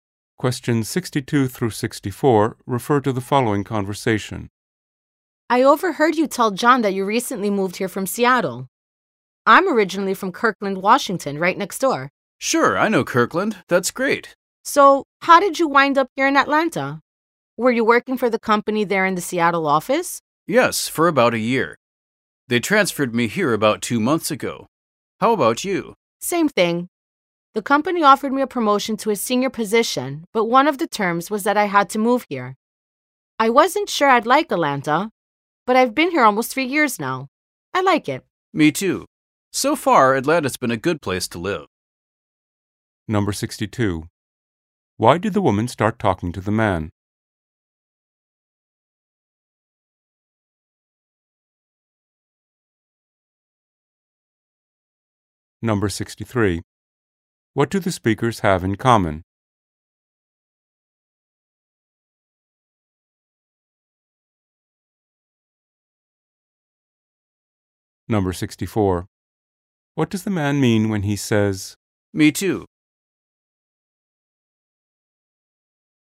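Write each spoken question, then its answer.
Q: Why did the woman start talking to the man?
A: She overheard that he had moved from Seattle

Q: What do the speakers have in common?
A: The company transferred both of them to Atlanta

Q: What does the man mean when he says,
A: He also likes living in Atlanta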